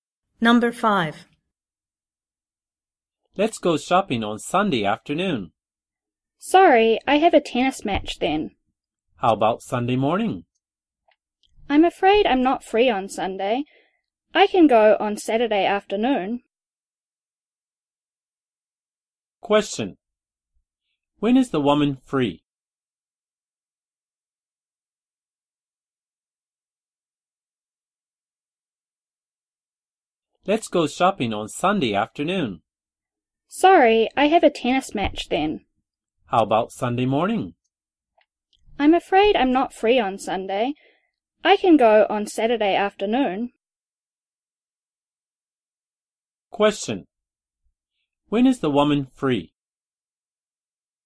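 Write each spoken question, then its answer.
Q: When is the woman free?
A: Saturday afternoon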